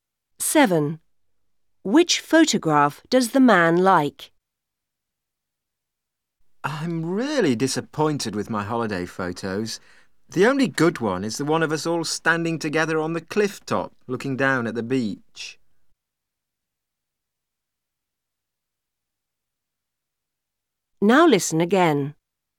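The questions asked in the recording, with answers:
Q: Which photograph does the man like?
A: The one of them all standing together on the cliff top, looking down at the beach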